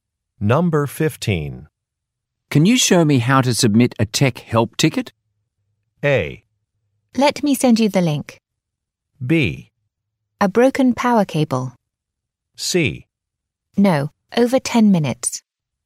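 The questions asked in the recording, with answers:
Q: Can you show me how to submit a tech help ticket?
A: A: Let me send you the link.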